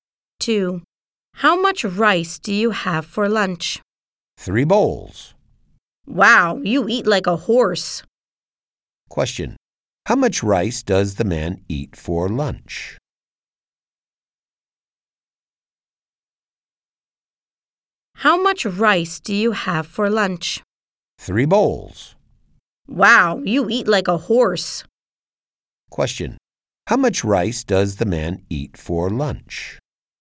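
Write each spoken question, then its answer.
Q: How much rice does the man eat for lunch?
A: 3 bowls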